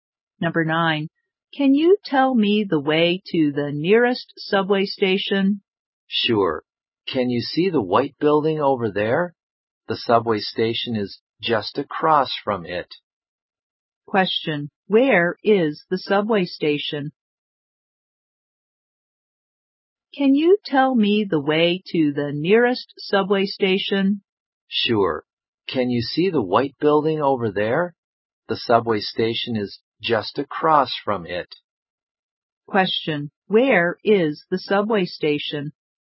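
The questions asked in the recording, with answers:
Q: Question, where is the subway station?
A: Across from the white building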